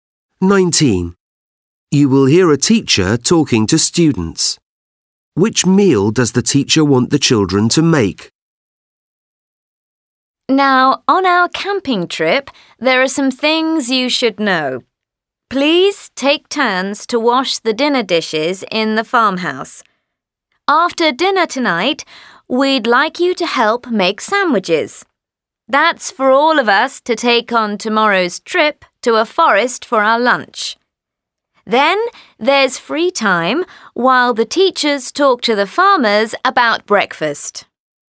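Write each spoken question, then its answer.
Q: Which meal does the teacher want the children to make?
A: Lunch (sandwiches for tomorrow's trip)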